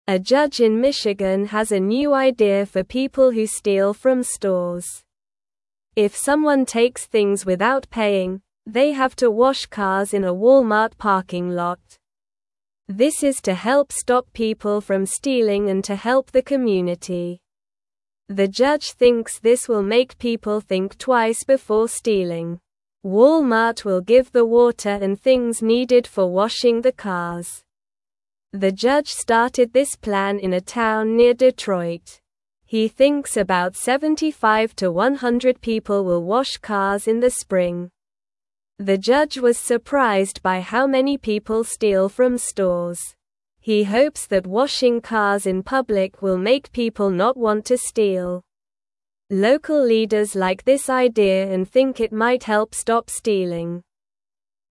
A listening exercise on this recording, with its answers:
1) If someone takes (1)______ without paying, they (2)______ to wash cars in a Walmart parking lot.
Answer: things

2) If someone takes (1)______ without paying, they (2)______ to wash cars in a Walmart parking lot.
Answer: have

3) The judge thinks this will (3)______ people think twice before stealing.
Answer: make

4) Walmart will give the (4)______ and things needed for (5)______ing the cars.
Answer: water

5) Walmart will give the (4)______ and things needed for (5)______ing the cars.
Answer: wash

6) He thinks about 75 to 100 (6)______ will wash cars in the spring.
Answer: people

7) (7)______ (8)______ like this idea and think it might help stop stealing.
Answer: Local

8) (7)______ (8)______ like this idea and think it might help stop stealing.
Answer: leaders

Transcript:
A judge in Michigan has a new idea for people who steal from stores. If someone takes things without paying, they have to wash cars in a Walmart parking lot. This is to help stop people from stealing and to help the community. The judge thinks this will make people think twice before stealing. Walmart will give the water and things needed for washing the cars.
The judge started this plan in a town near Detroit. He thinks about 75 to 100 people will wash cars in the spring. The judge was surprised by how many people steal from stores. He hopes that washing cars in public will make people not want to steal. Local leaders like this idea and think it might help stop stealing.

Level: Level 1